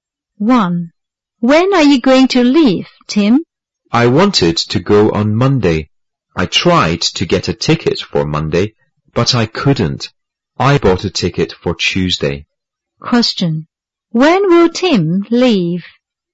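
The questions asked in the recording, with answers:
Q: Question. When will Tim leave?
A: On Tuesday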